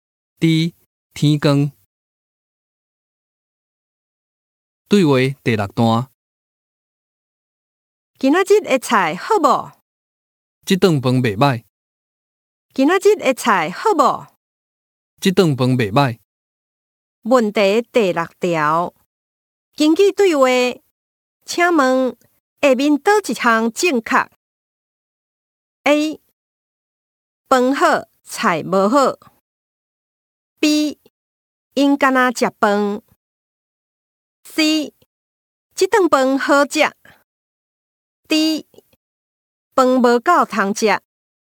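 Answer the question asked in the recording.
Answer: C: 这顿饭好食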